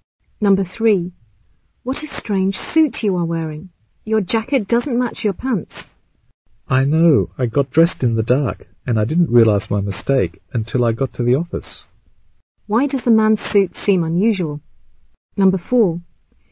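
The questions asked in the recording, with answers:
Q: Why does the man's suit seem unusual?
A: His jacket doesn't match his pants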